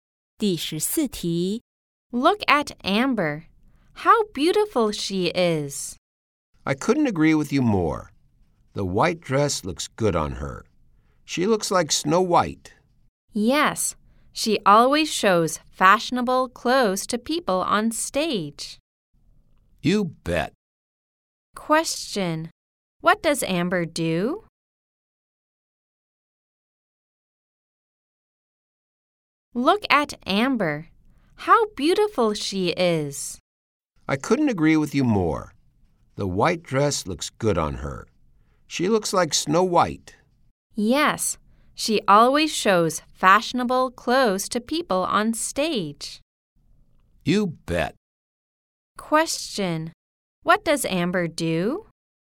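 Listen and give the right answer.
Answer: She is a model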